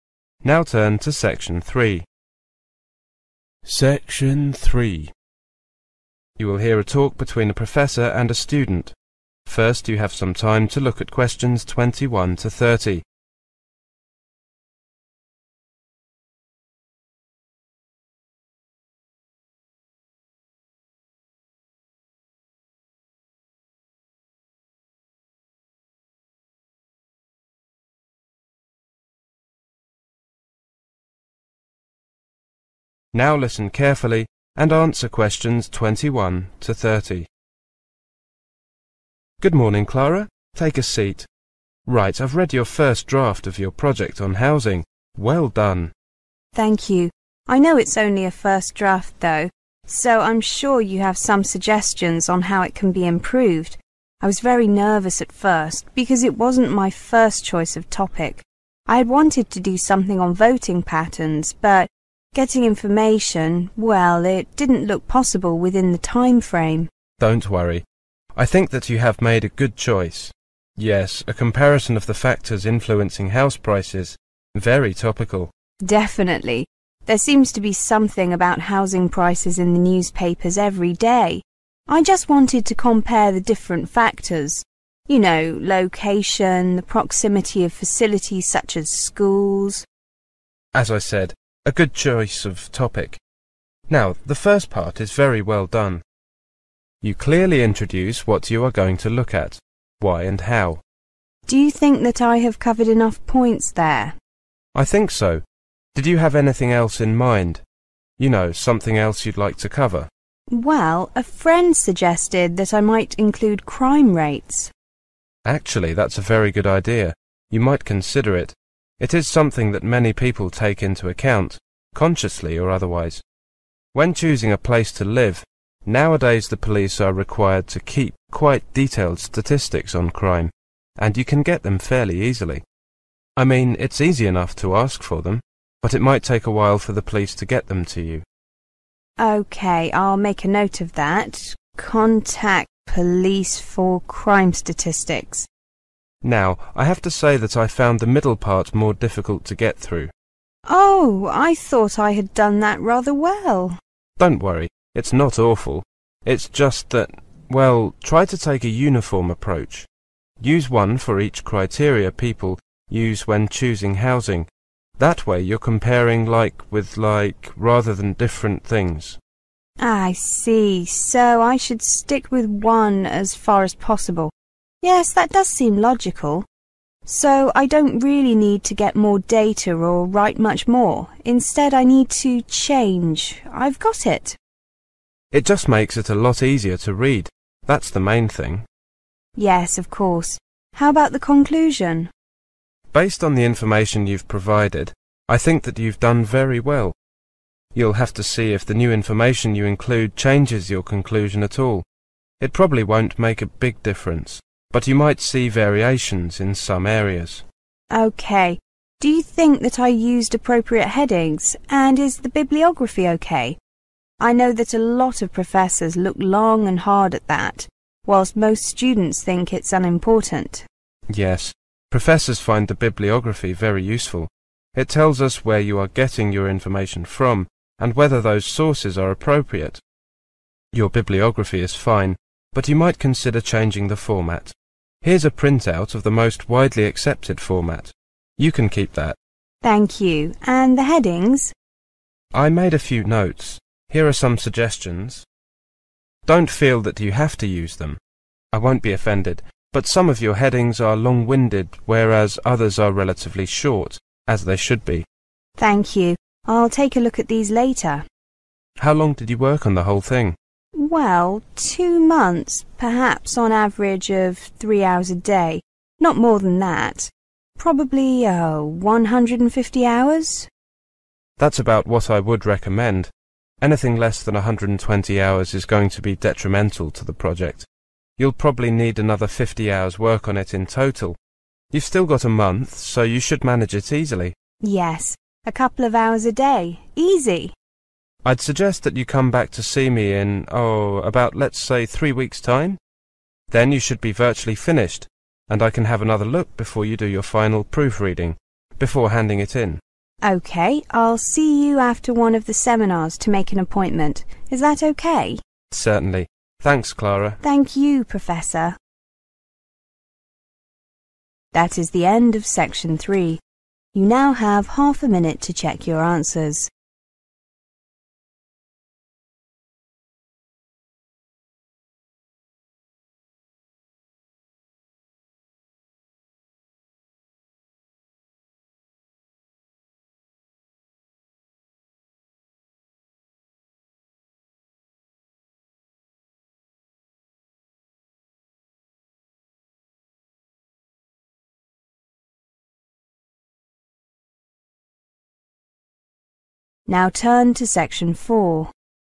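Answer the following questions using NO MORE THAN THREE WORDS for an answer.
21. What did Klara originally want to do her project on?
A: voting patterns

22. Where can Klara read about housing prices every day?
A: in the newspapers

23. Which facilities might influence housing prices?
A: schools

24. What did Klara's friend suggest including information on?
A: crime rates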